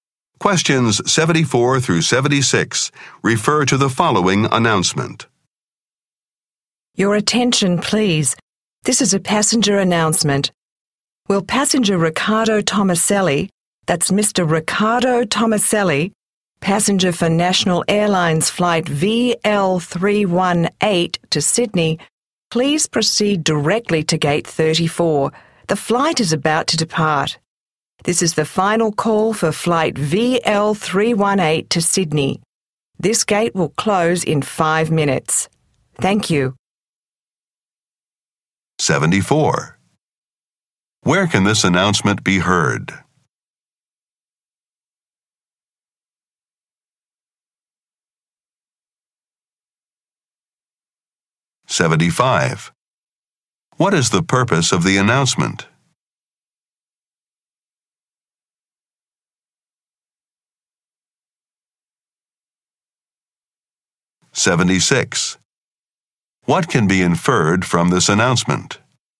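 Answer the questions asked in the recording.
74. At an airport
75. To give a final call to a passenger
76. Mr. Tomaselli is late for his flight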